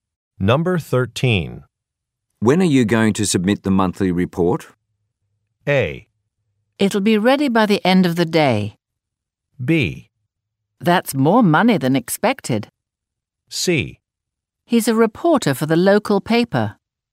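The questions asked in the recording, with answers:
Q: When are you going to submit the monthly report?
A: A: It'll be ready by the end of the day.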